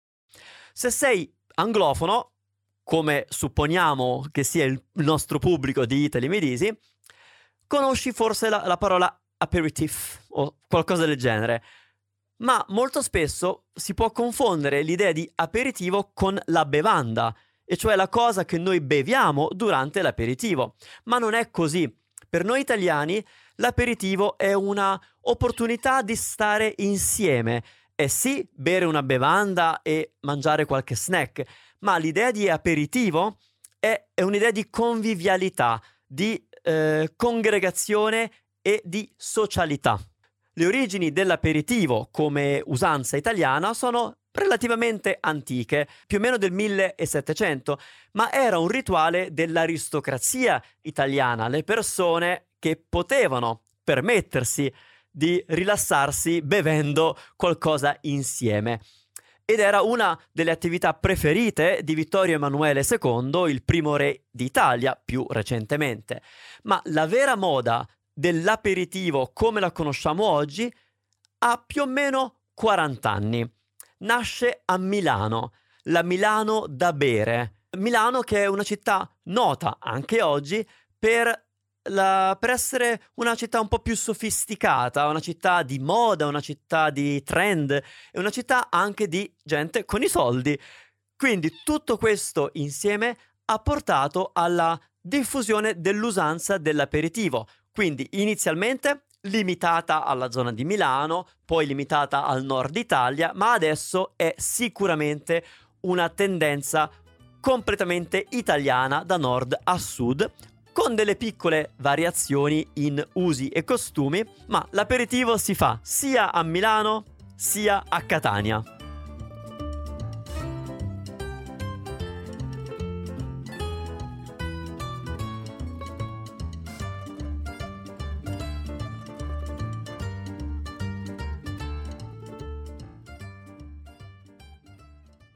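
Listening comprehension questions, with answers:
Here are your TRUE/ FALSE Comprehension questions.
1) L'aperitivo è semplicemente la bevanda che si beve prima di cena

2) L'usanza dell'aperitivo in Italia è recente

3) Il primo re d'Italia amava l'usanza di fare l'aperitivo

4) L'usanza dell'aperitivo è nata a Milano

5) Al Sud Italia non si usa fare l'aperitivo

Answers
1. Falso
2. Falso
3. Vero
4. Vero
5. Falso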